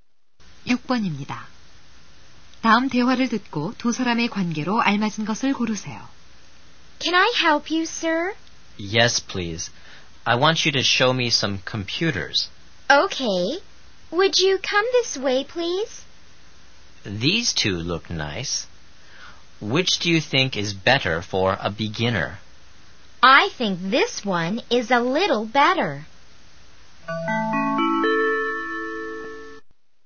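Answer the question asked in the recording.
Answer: 점원과 손님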